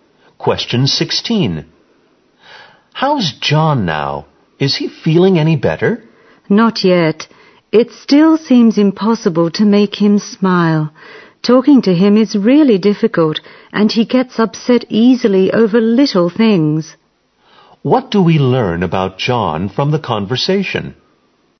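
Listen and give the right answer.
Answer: He is still unhappy, hard to talk to and gets upset easily.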